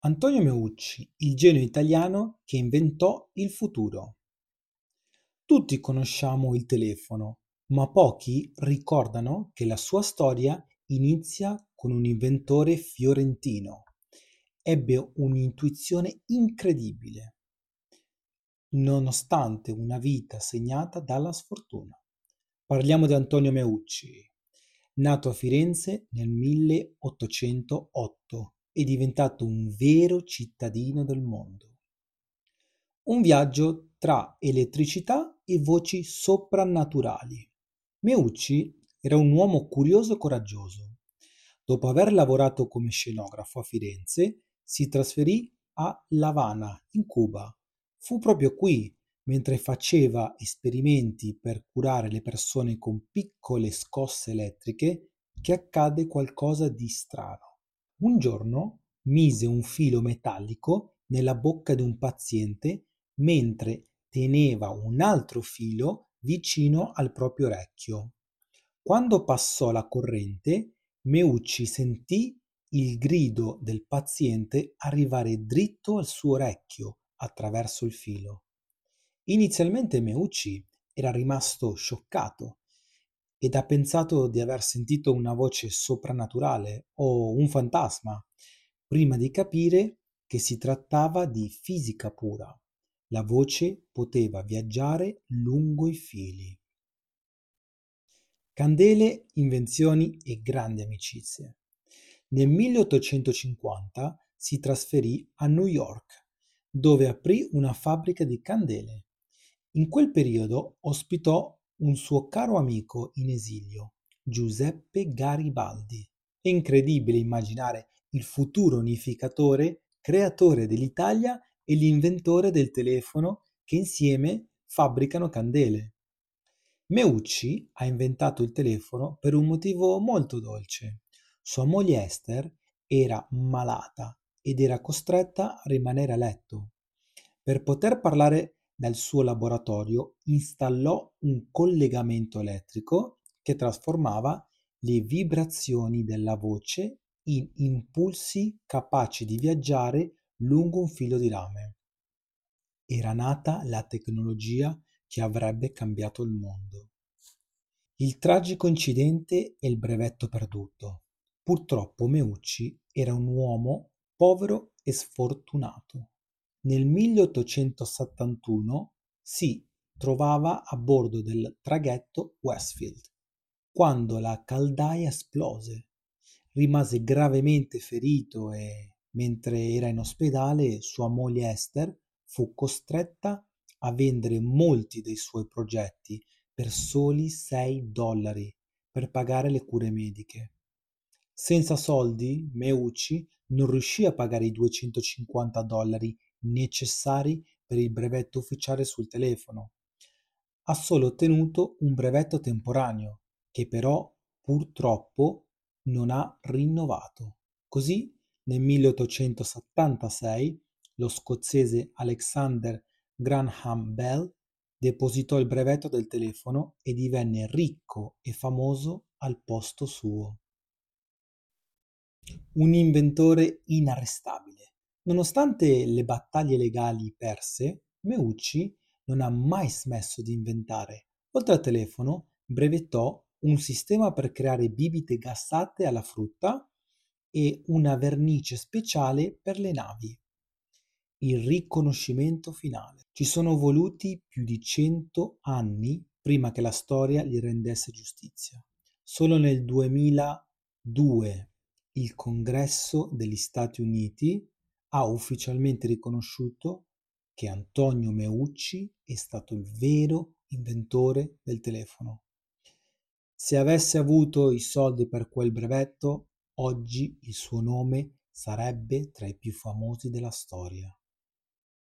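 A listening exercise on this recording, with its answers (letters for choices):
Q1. Dove si trovava Meucci quando sentì per la prima volta una voce viaggiare attraverso un filo elettrico?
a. A Firenze, nel suo studio di scenografo.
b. A L'Avana, a Cuba, durante esperimenti medici.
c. A Staten Island, nella sua fabbrica di candele.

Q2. Quale famoso personaggio storico fu ospite di Meucci a New York e lo aiutò a fabbricare candele?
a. Alexander Graham Bell.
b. Thomas Edison.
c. Giuseppe Garibaldi.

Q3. Qual era lo scopo principale per cui Meucci installò il primo "Telettrofono" nella sua casa?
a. Comunicare con i suoi operai in fabbrica.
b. Parlare con la moglie Ester, che era malata a letto.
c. Chiamare i soccorsi in caso di emergenza.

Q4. Cosa accadde ai prototipi di Meucci mentre lui era in ospedale dopo l'esplosione del traghetto Westfield?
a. Vennero rubati da Alexander Graham Bell.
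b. Furono venduti dalla moglie a un robivecchi per 6 dollari.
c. Andarono distrutti nell'incendio della fabbrica.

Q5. 5. Perché Meucci non riuscì a ottenere il brevetto definitivo per il telefono?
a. Perché non aveva i 250 dollari necessari per pagarlo.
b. Perché il governo degli Stati Uniti non credeva alla sua invenzione.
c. Perché aveva perso i disegni originali durante il naufragio.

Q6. Oltre al telefono, quale di queste invenzioni è attribuita a Meucci?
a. La lampadina a incandescenza.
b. Il motore a scoppio per le navi.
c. Un sistema per creare bibite gassate alla frutta.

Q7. In quale anno il Congresso degli Stati Uniti ha ufficialmente riconosciuto Meucci come inventore del telefono?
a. Nel 1889, l'anno della sua morte.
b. Nel 1976, al centenario del brevetto di Bell.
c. Nel 2002.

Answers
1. b
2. c
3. b
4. b
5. a
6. c
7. c

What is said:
Antonio Meucci: Il Genio Italiano che Inventò il Futuro
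Tutti conosciamo il telefono, ma pochi ricordano che la sua storia inizia con un inventore fiorentino che ebbe un'intuizione incredibile, nonostante una vita segnata dalla sfortuna. Parliamo di Antonio Meucci, nato a Firenze nel 1808 e diventato un vero cittadino del mondo.
Un Viaggio tra Elettricità e "Voci Soprannaturali"
Meucci era un uomo curioso e coraggioso. Dopo aver lavorato come scenografo a Firenze, si trasferì a L'Avana, in Cuba. Fu proprio qui, mentre faceva esperimenti per curare le persone con piccole scosse elettriche, che accadde qualcosa di strano.
Un giorno, mise un filo metallico nella bocca di un paziente mentre teneva un altro filo vicino al proprio orecchio. Quando passò la corrente, Meucci sentì il grido del paziente arrivare dritto al suo orecchio attraverso il filo. Inizialmente Meucci era rimasto shoccato ed ha pensato di aver sentito una voce soprannaturale o un fantasma, prima di capire che si trattava di fisica pura: la voce poteva viaggiare lungo i fili!
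Candele, Invenzioni e Grandi Amicizie
Nel 1850, Meucci si trasferisce a New York, dove aprì una fabbrica di candele. In quel periodo ospitò un suo caro amico in esilio: Giuseppe Garibaldi. È incredibile immaginare il futuro unificatore creatore dell'Italia e l'inventore del telefono che, insieme, fabbricano candele.
Meucci ha inventato il telefono per un motivo molto dolce: sua moglie Ester era malata ed era costretta a rimanere a letto. Per poterle parlare dal suo laboratorio, installò un collegamento elettrico che trasformava le vibrazioni della voce in impulsi capaci di viaggiare lungo un filo di rame. Era nata la tecnologia che avrebbe cambiato il mondo.
Il Tragico Incidente e il Brevetto Perduto
Purtroppo, Meucci era un uomo povero e sfortunato. Nel 1871, si trovava a bordo del traghetto Westfield quando la caldaia esplose. Rimase gravemente ferito e, mentre era in ospedale, sua moglie Ester fu costretta a vendere molti dei suoi progetti per soli 6 dollari per pagare le cure mediche.
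Senza soldi, Meucci non riuscì a pagare i 250 dollari necessari per il brevetto ufficiale sul telefono. Ha solo ottenuto un brevetto temporaneo, che però purtroppo non ha rinnovato. Così, nel 1876, lo scozzese Alexander Graham Bell depositò il brevetto del telefono e divenne ricco e famoso al posto suo.
Un Inventore Inarrestabile
Nonostante le battaglie legali perse, Meucci non ha mai smesso di inventare. Oltre al telefono, brevettò:
Una vernice speciale per le navi.
Il Riconoscimento Finale
Ci sono voluti più di cento anni perché la storia gli rendesse giustizia. Solo nel 2002, il Congresso degli Stati Uniti ha ufficialmente riconosciuto che Antonio Meucci è stato il vero inventore del telefono. Se avesse avuto i soldi per quel brevetto, oggi il suo nome sarebbe tra i più famosi della storia.
Antonio Meucci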